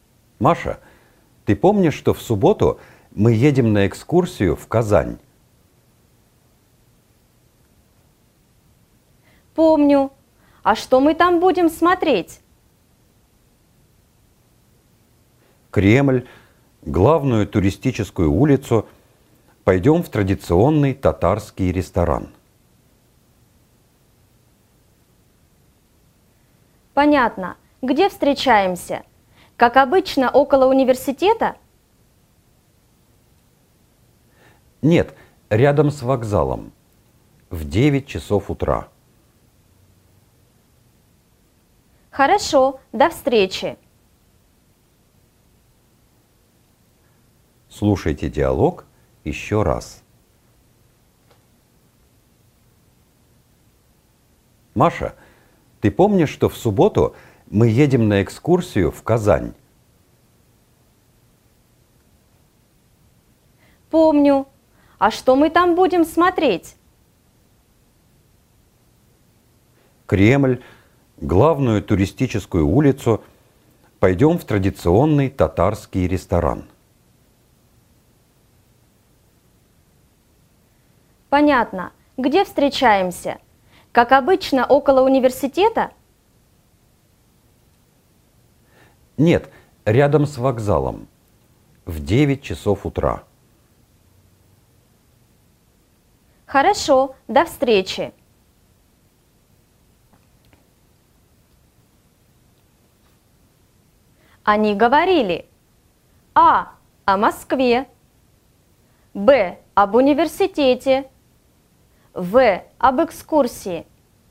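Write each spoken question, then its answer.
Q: Они говорили: а.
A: В: об экскурсии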